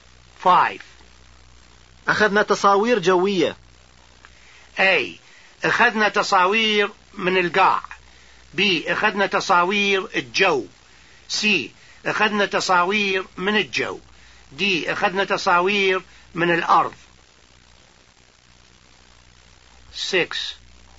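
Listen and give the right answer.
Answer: C: أخذنا تصاوير من الجو.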